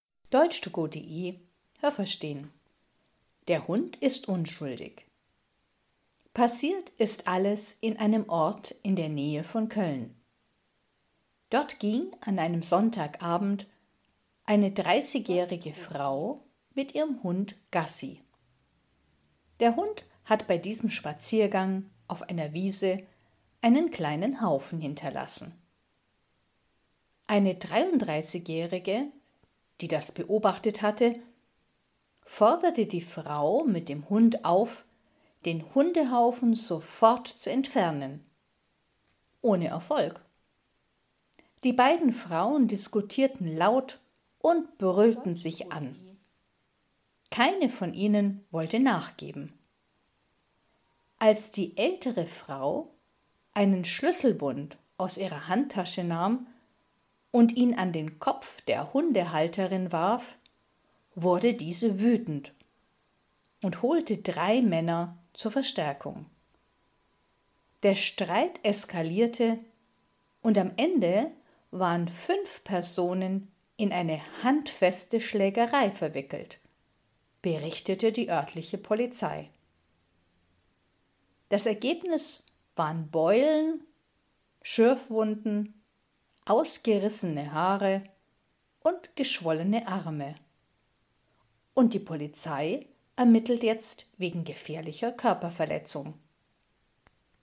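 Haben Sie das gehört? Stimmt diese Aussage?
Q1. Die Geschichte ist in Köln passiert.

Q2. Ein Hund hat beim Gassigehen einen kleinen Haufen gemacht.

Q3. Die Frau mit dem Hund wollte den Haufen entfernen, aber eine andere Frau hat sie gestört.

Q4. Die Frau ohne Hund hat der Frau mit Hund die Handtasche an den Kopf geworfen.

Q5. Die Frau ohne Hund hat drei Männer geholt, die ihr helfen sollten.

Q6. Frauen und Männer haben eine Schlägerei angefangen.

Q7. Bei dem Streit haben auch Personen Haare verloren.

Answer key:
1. falsch
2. richtig
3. falsch
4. falsch
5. falsch
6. richtig
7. richtig

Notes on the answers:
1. Sie ist in einem Ort in der Nähe von Köln passiert.
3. Die Frau mit dem Hund wollte den Hundehaufen nicht entfernen. Das hat die andere Frau gestört.
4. Sie hat ihr den Schlüsselbund an den Kopf geworfen.
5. Die Frau mit Hund hat das gemacht.

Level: B (mittel)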